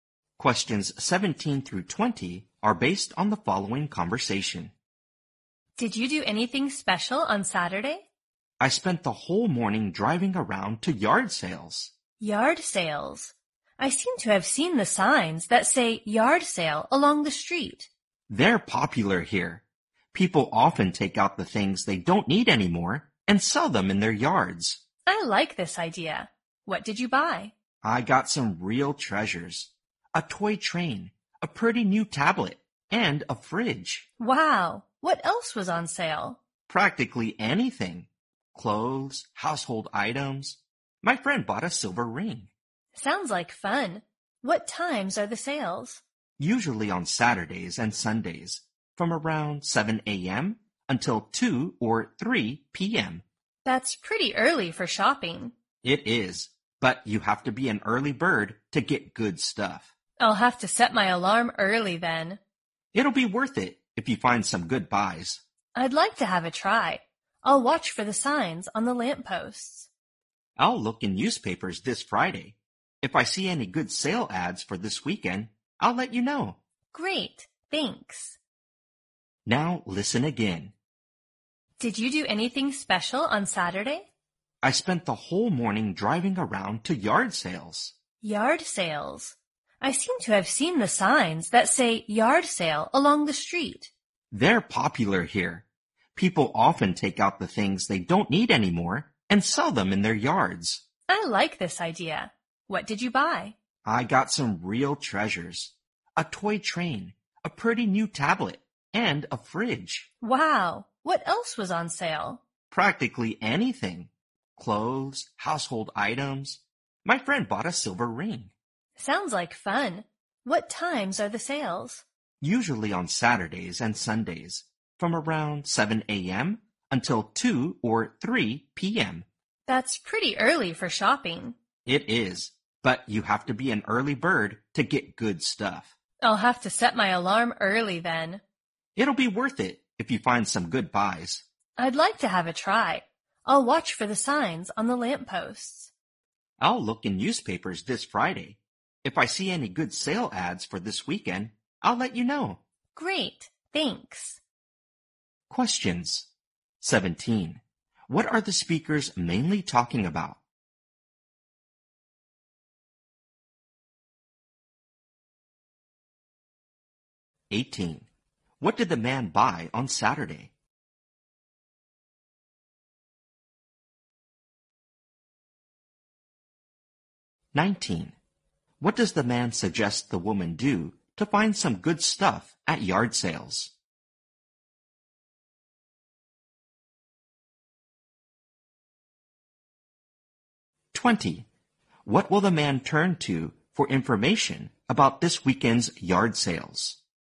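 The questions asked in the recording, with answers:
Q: What are the speakers mainly talking about?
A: Yard sales

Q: What did the man buy on Saturday?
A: A toy train, a tablet and a fridge

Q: What does the man suggest the woman do to find some good stuff at yard sales?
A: Go early

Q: What will the man turn to for information about this weekend's yard sales?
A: Newspapers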